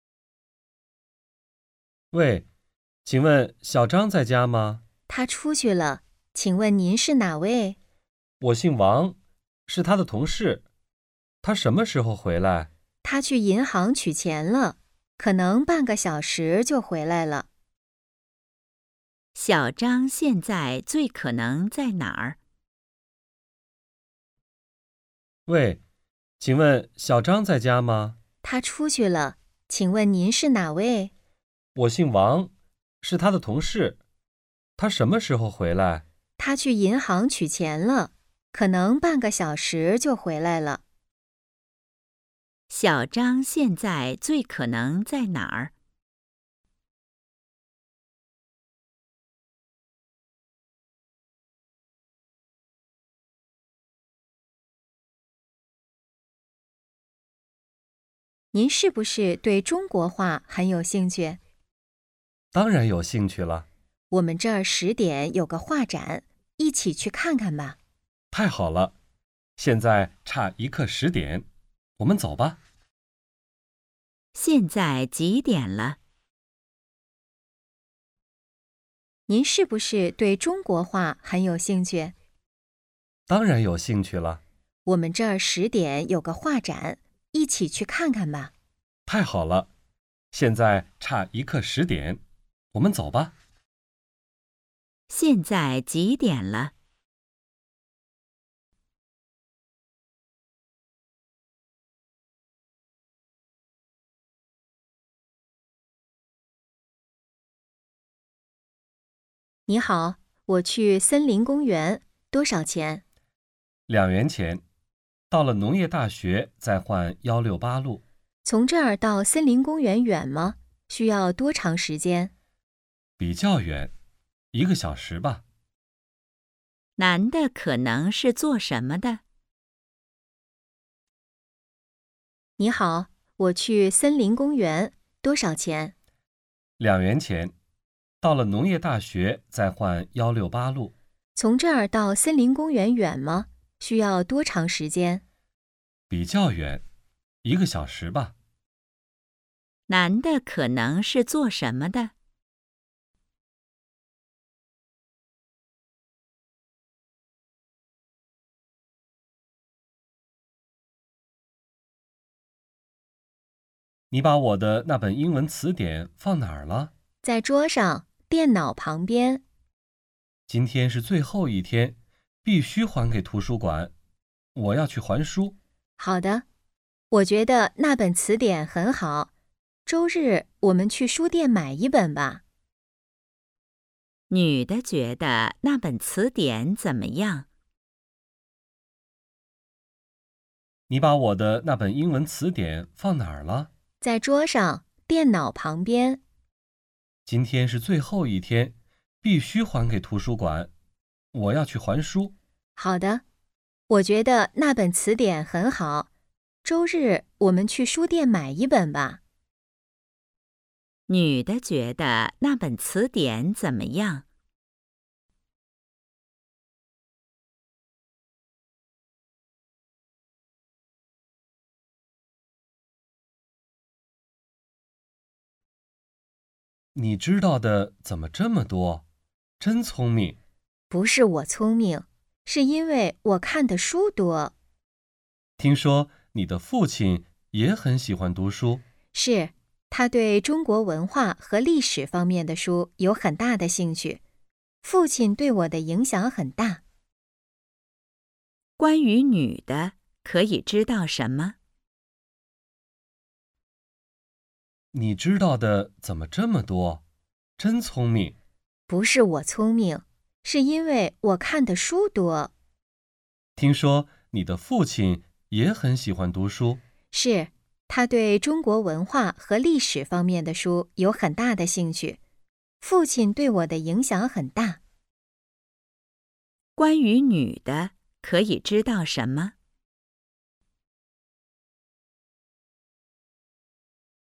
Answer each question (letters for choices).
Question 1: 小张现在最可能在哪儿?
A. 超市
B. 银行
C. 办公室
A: B

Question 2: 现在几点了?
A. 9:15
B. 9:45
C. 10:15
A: B

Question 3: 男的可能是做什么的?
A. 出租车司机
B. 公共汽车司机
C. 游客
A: B

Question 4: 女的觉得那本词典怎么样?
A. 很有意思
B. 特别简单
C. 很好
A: C

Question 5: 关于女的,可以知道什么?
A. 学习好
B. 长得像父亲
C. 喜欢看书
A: C

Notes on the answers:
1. 男:喂,请问小张在家吗? 女:他出去了,请问您是哪位? 男:我姓王,是他的同事。他什么时候回来? 女:他去银行取钱了,可能半个小时就回来了。
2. 女:您是不是对中国画很有兴趣? 男:当然有兴趣了。 女:我们这儿十点有个画展,一起去看看吧。 男:太好了!现在差一刻十点,我们走吧。
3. 女:你好!我去森林公园,多少钱? 男:两元钱,到了农业大学再换168路。 女:从这儿到森林公园远吗?需要多长时间? 男:比较远,一个小时吧。
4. 男:你把我的那本英文词典放哪儿了? 女:在桌上,电脑旁边。 男:今天是最后一天,必须还给图书馆,我要去还书。 女:好的。我觉得那本词典很好,周日我们去书店买一本吧。
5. 男:你知道的怎么这么多?真聪明! 女:不是我聪明,是因为我看的书多。 男:听说你的父亲也很喜欢读书。 女:是,他对中国文化和历史方面的书有很大的兴趣,父亲对我的影响很大。

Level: 汉语水平考试(HSK)三级